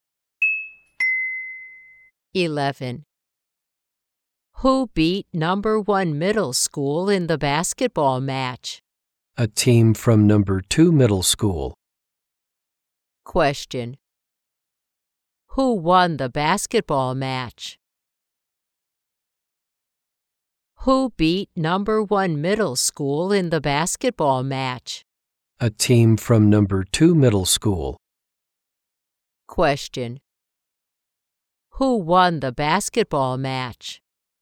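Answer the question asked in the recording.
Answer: A team from Number Two Middle School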